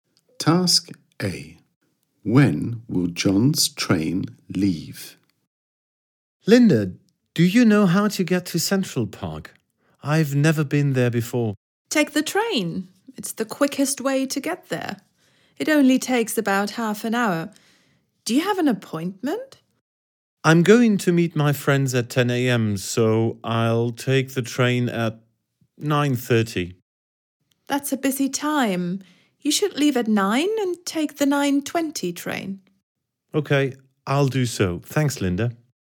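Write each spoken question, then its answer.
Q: When will John's train leave?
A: at 9:20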